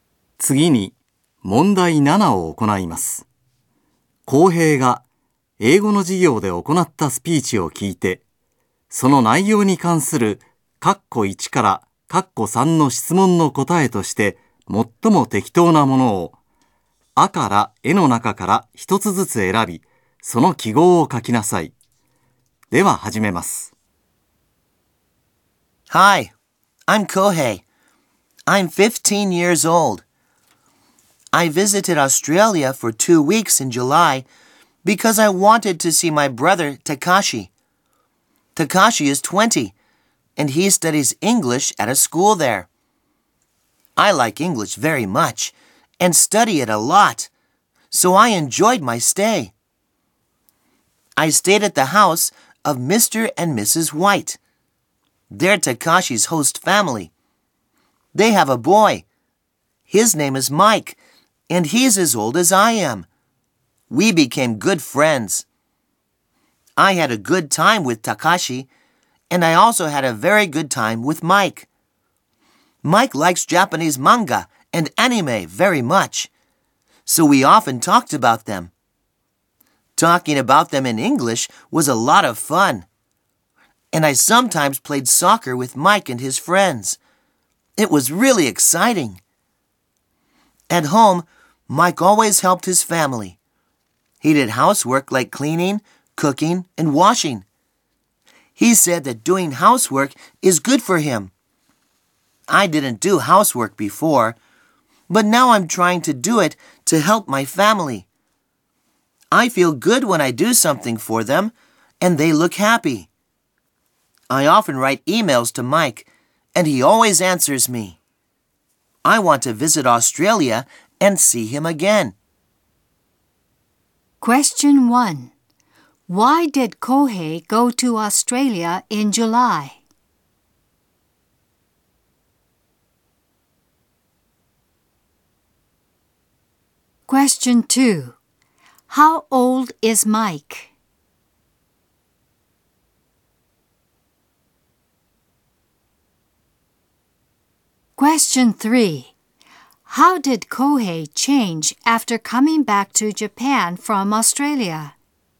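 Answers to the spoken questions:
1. Because he wanted to see his brother, Takashi.
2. 15 years old.
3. He started trying to do housework to help his family.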